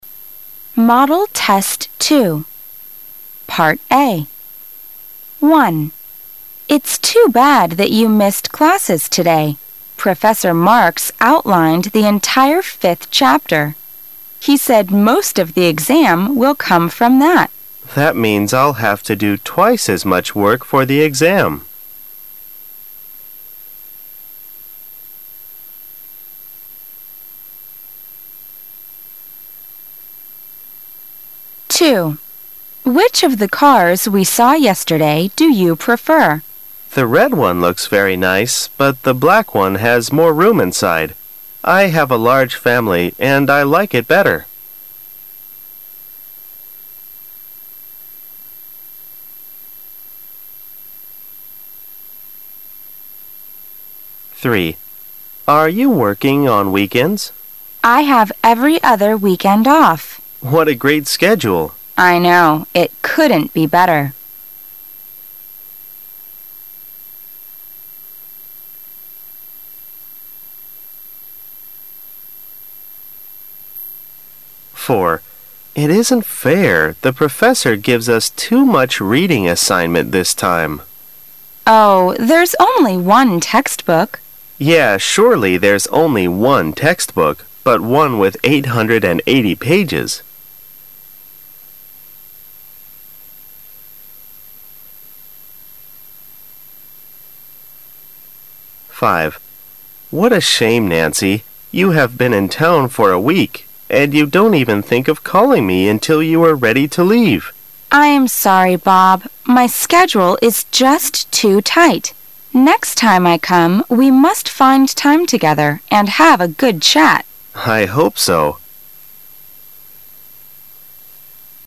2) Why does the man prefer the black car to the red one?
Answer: It's larger inside.

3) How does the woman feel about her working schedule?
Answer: It is wonderful.

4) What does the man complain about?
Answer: Too much reading.

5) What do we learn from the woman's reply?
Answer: She will find time to meet Bob on her next visit.

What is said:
[解析] W: It's too bad that you missed classes today. Professor Marks outlined the entire fifth chapter. He said most of the exam will come from that. M: That means I'll have to do twice as much work for the exam.
[解析] W: Which of the cars we saw yesterday do you prefer? M: The red one looks very nice, but the black one has more room inside. I have a large family and I like it better.
A
[解析] M: Are you working on weekends? W: I have every other weekend off. M: What a great schedule! W: I know. It couldn't be better.
A
[解析] M: It isn't fair -- the professor gives us too much reading assignment this time. W: Oh, there's only one textbook. M: Yeah, surely there's only one textbook, but one with 880 pages.
A
[解析] M: What a shame, Nancy. You have been in town for a week, and you don't even think of calling me until you were ready to leave! W: I am sorry, Bob. My schedule is just too tight. Next time I come, we must find time together and have a good chat. M: I hope so.